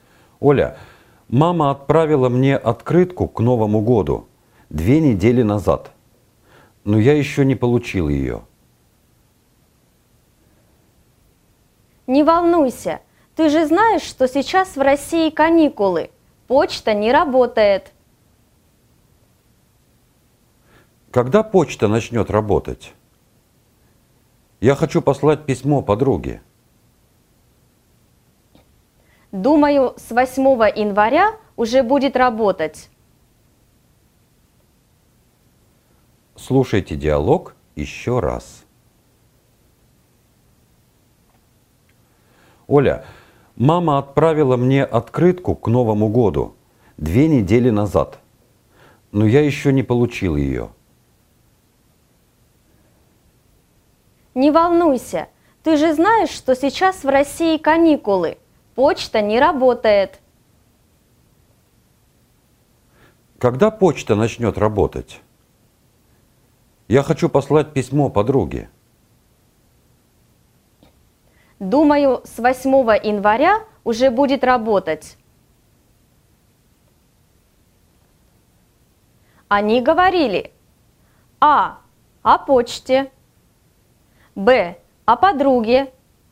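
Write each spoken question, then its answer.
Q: Они говорили: А. о почте.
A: А: о почте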